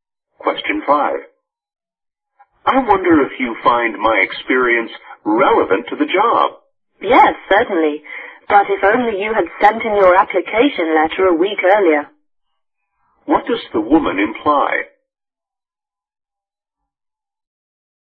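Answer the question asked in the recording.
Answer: The man applied too late for the job.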